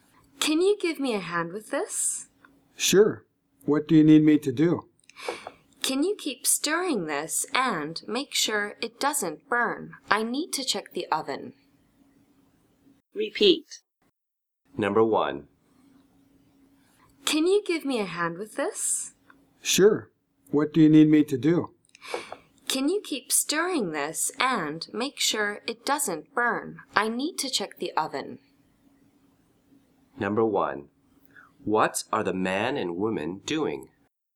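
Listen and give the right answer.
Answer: Cooking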